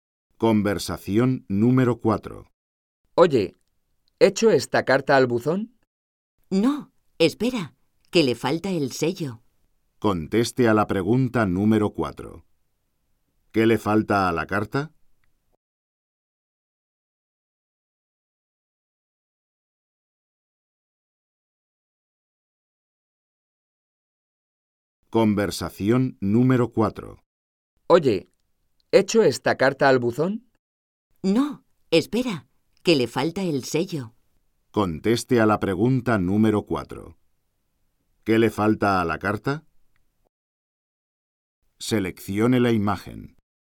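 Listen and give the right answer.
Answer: El sello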